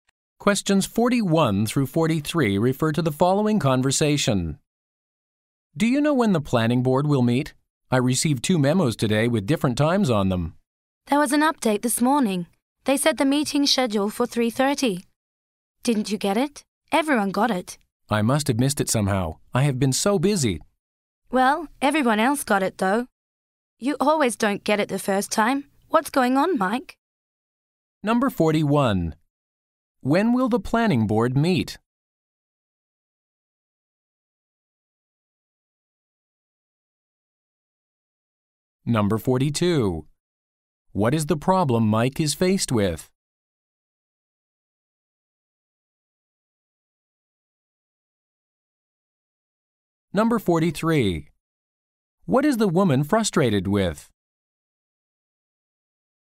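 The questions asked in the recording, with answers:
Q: When will the planning board meet?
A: At 3:30

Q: What is the problem Mike is faced with?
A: He missed the schedule update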